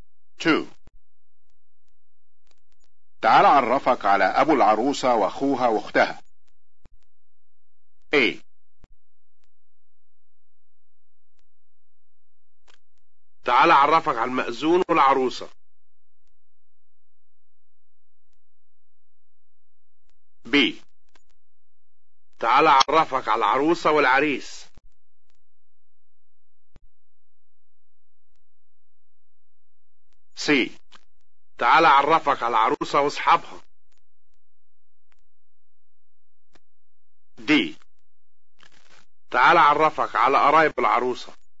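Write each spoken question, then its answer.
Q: تعال عرفك على أبو العروسة وأخوها وأختها.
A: D: تعال عرفك على قرايب العروسة.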